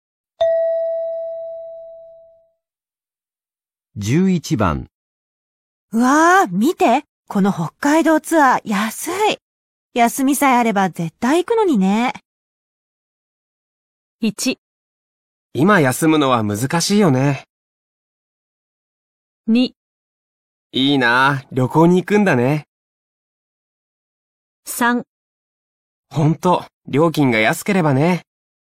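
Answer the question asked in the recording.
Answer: 1: 今休むのは難しいよね。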